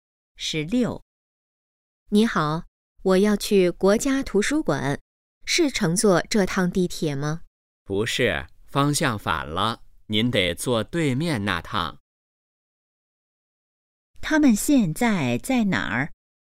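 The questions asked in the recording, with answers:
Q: 他们现在在哪儿?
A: 地铁站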